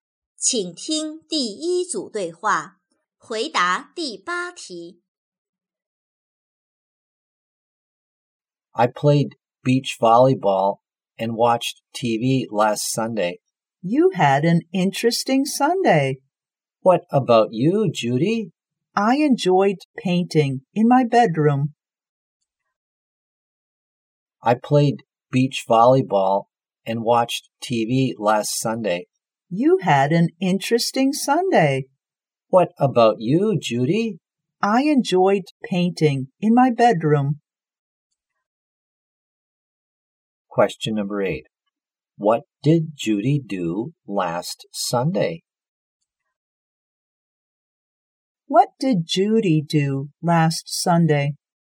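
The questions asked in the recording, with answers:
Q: What did Judy do last Sunday?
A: She painted in her bedroom.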